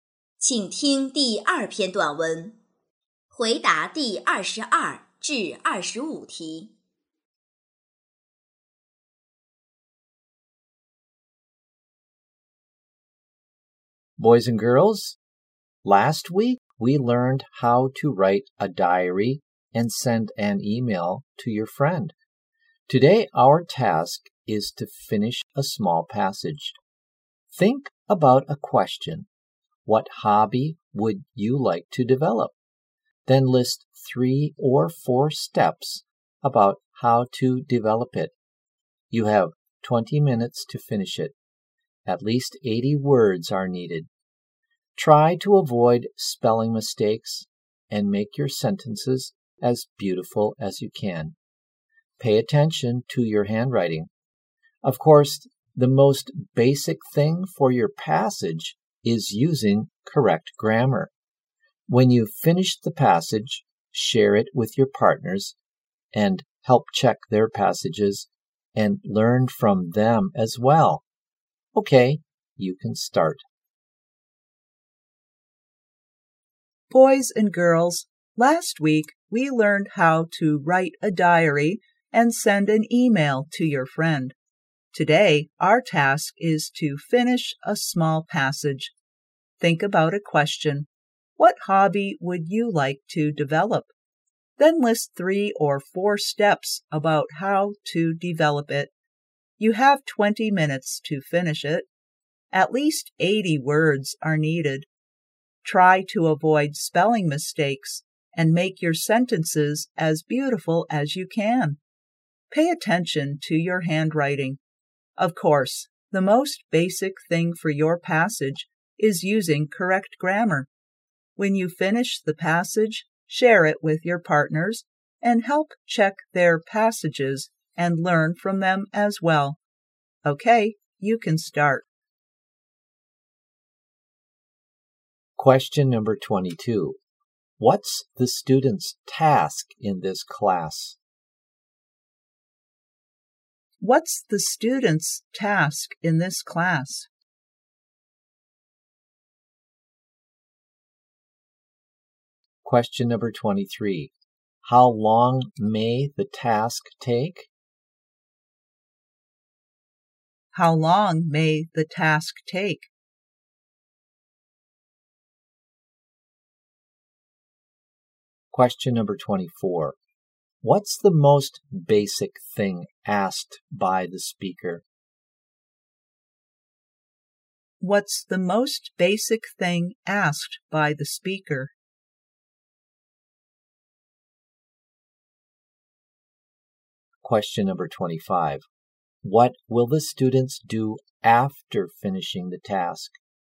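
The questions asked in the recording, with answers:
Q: What's the student's task in this class?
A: To finish a small passage about a hobby

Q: How long may the task take?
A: 20 minutes

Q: What's the most basic thing asked by the speaker?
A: Using correct grammar

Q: What will the students do after finishing the task?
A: Share it with their partners and check their passages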